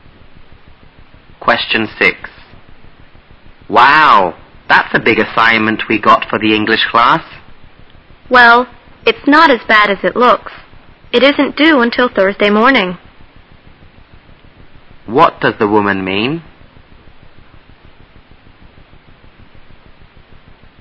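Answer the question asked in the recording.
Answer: The assignment isn't as hard as it looks; it isn't due until Thursday morning.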